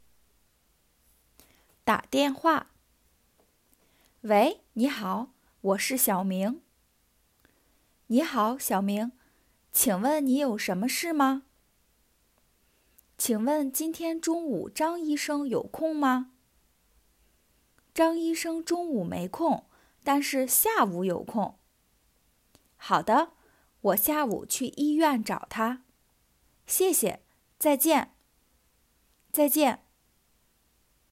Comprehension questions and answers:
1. 小明为什么打电话?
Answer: 找医生

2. 张医生什么时候有空?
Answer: 下午

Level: beginners